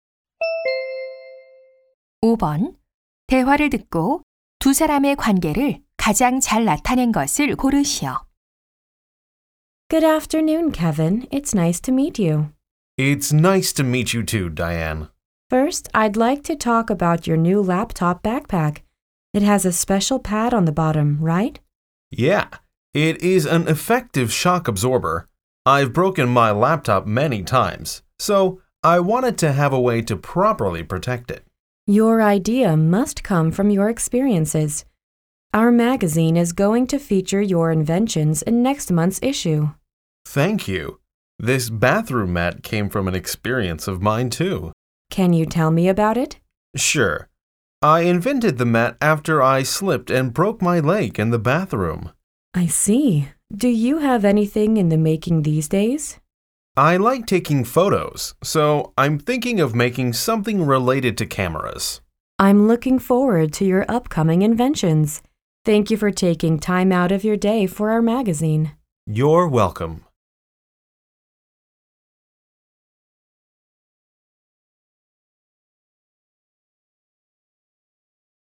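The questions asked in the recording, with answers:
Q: 대화를 듣고 두 사람의 관계를 가장 잘 나타낸 것을 고르시오.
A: 잡지 기자 - 발명가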